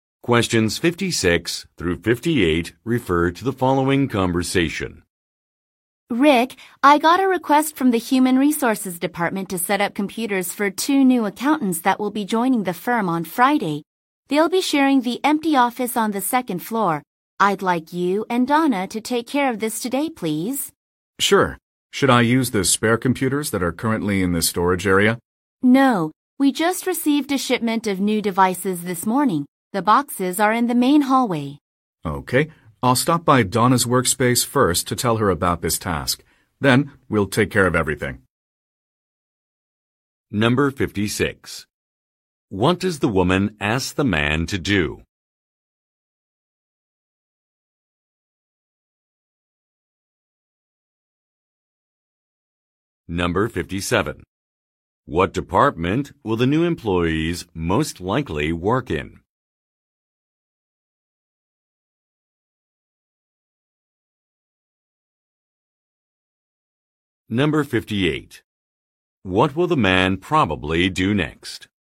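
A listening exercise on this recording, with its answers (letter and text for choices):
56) What does the woman ask the man to do?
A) Clean out an office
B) Install some devices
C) Read some instructions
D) Train a coworker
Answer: B) Install some devices

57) What department will the new employees most likely work in?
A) Accounting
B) Marketing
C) Human resources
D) Information technology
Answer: A) Accounting

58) What will the man probably do next?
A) Visit a colleague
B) Unload a package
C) Return a shipment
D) Assist an intern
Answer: A) Visit a colleague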